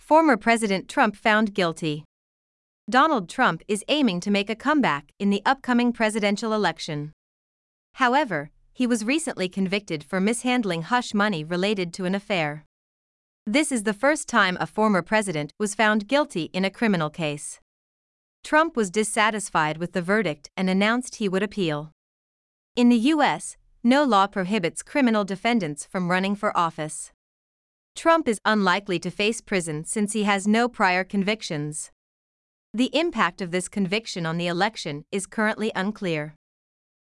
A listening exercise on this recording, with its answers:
「誰が(Who)」「何をしたのか(What)」「なぜ(Why)」の答えを探しながら聞きましょう。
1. 誰が(Who)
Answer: ドナルド・ドランプ氏が(Donald Trump)

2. 何をしたのか(What)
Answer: 最近、有罪判決を受けた、(was recently <convicted / found guilty> )

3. なぜ(Why)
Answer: 不倫の口止め料を不正に処理したという理由で。(for mishandling hush money related to an affair.)

英語ニュースの音声を聞き、各空欄に入る英文を正確に書き取ってください。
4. Donald Trump is aiming to ( ) .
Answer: make a comeback in the upcoming presidential election

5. However, he was recently convicted for ( ).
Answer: mishandling hush money related to an affair

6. This is ( ) in a criminal case.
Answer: the first time a former president was found guilty

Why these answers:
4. 「comeback」は1つの名詞として、「復帰」や「再挑戦」を意味します。「come back」は動詞句で、「戻ってくる」という意味になります。
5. 日頃から英文記事に触れて語彙を強化しましょう。このTopicの英文記事に「hush money」という表現が出ています。

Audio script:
Former President Trump Found Guilty
Donald Trump is aiming to make a comeback in the upcoming presidential election.
However, he was recently convicted for mishandling hush money related to an affair.
This is the first time a former president was found guilty in a criminal case.
Trump was dissatisfied with the verdict and announced he would appeal.
In the US, no law prohibits criminal defendants from running for office.
Trump is unlikely to face prison since he has no prior convictions.
The impact of this conviction on the election is currently unclear.

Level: 中級脱出